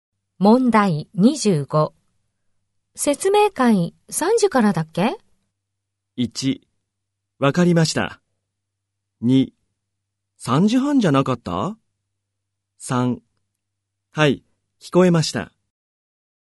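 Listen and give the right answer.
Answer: 2: 3時半じゃなかった?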